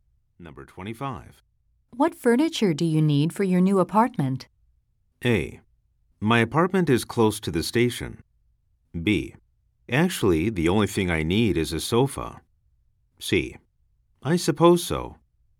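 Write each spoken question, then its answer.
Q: What furniture do you need for your new apartment?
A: B: Actually, the only thing I need is a sofa.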